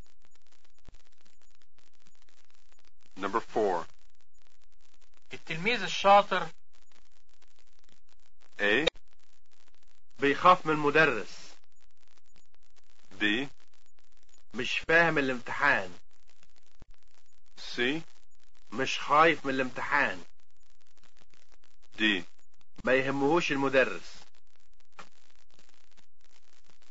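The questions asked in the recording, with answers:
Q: التلميذ الشاطر.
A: C: مش خايف من الامتحان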